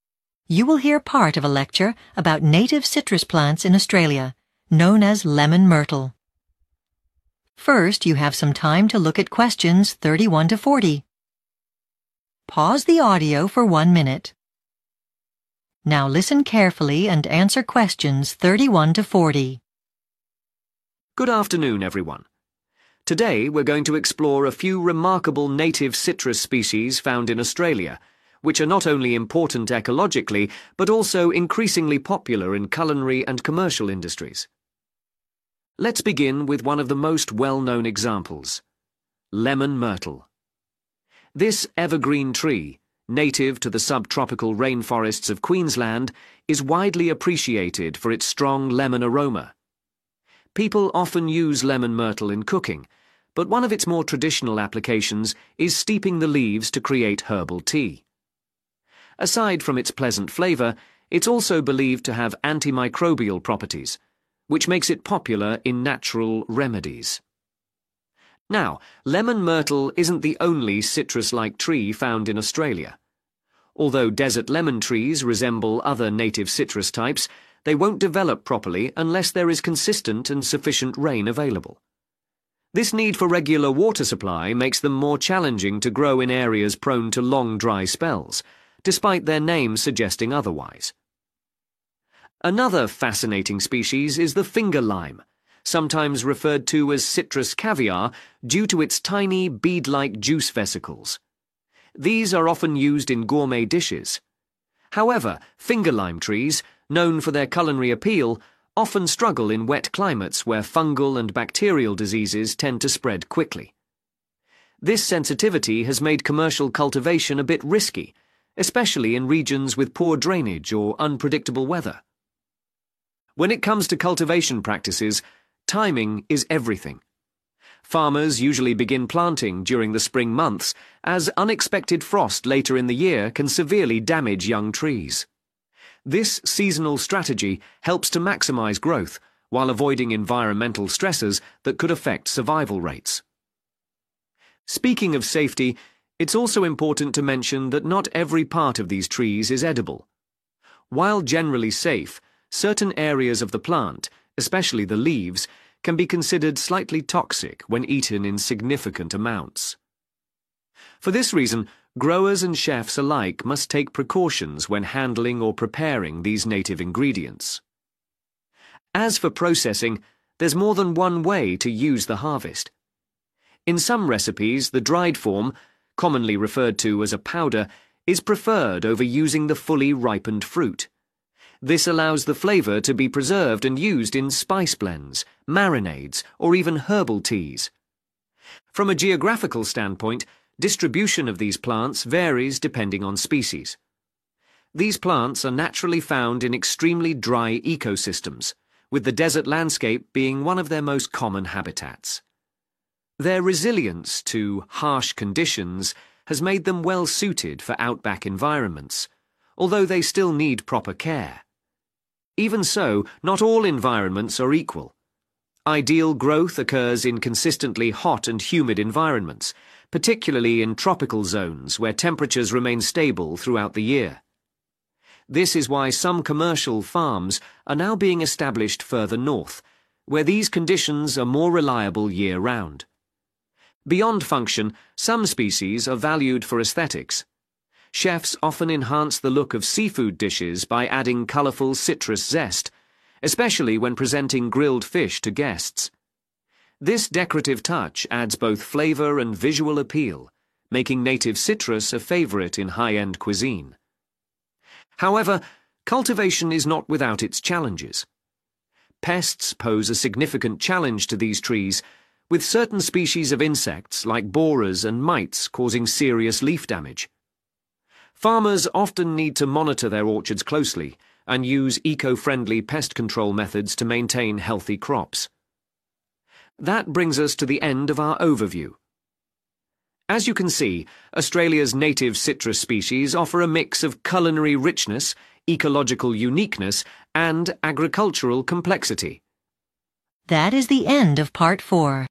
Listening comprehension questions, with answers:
Complete the sentences below. Write ONE WORD ONLY for each answer.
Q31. Lemon Myrtle trees are commonly used as herbs, spices, or brewed into 31 ..................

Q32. Desert Lemon trees are similar, but they require a plenty of 32 .................. to grow.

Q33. Finger lime trees are highly valued but easily affected by 33 ..................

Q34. They are planted in spring to protect them from 34 ..................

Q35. To avoid damage, they are usually planted in spring to escape 35 ..................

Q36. It is used either as a ripe fruit or as a 36 ..................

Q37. In the wild, they are typically spread in 37 .................. regions.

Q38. They grow best in a 38 .................. climate.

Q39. They are mainly used as a decoration, e.g. on 39 ..................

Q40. They can be harmed by 40 .................. such as mites and borers.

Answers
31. tea
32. rain
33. diseases
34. frost
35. stresses
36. powder
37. dry
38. trpical
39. fish
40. pests